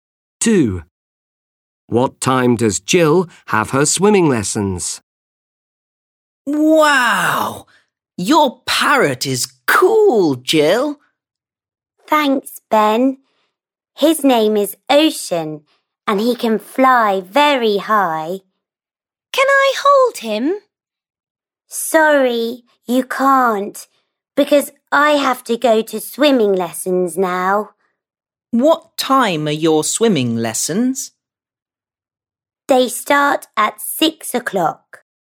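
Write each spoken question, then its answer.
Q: What time does Jill have her swimming lessons?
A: 6 o'clock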